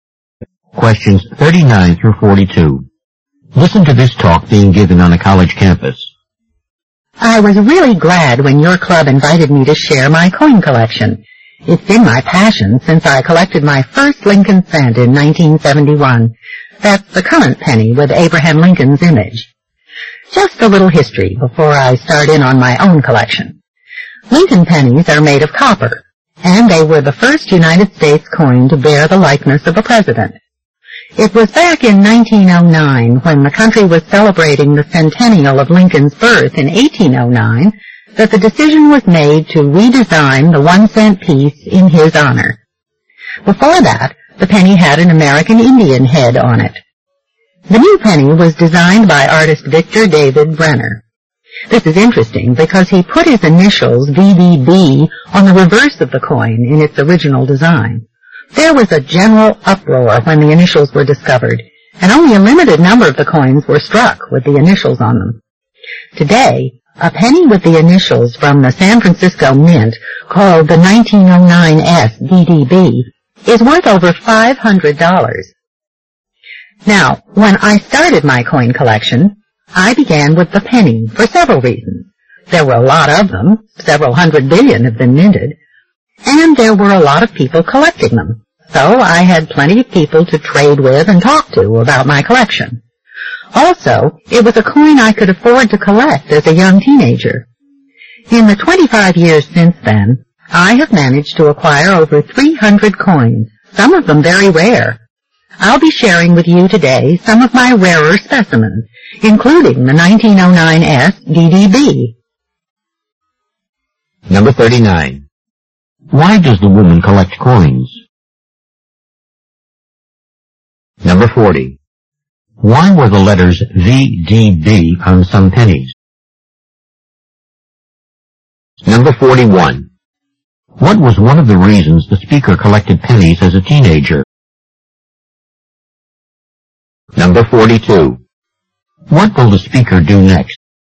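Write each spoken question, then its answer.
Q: Why were the letters VDB on some pennies?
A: They were the designer Victor David Brenner's initials

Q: What was one of the reasons the speaker collected pennies as a teenager?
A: She could afford them

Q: What will the speaker do next?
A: Show some of her rarer coins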